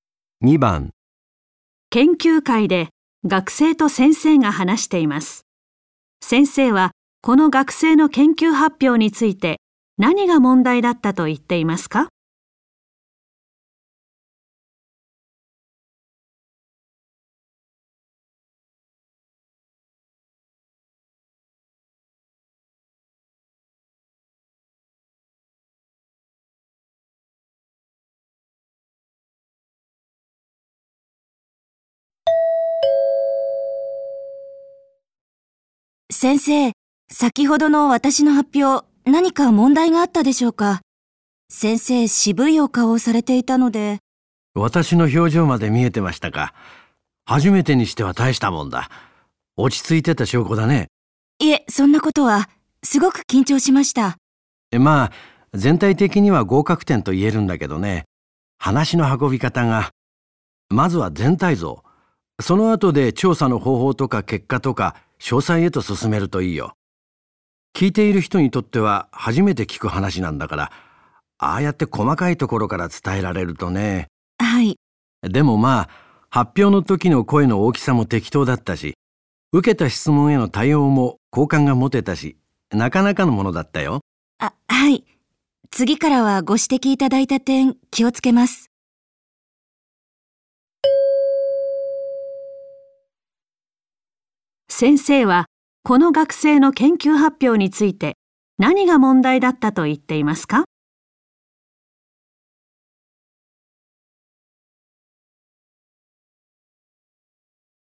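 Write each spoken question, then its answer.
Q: 先生はこの学生の研究発表について何が問題だったと言っていますか?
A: 話の順序(全体像より先に細かいところから話したこと)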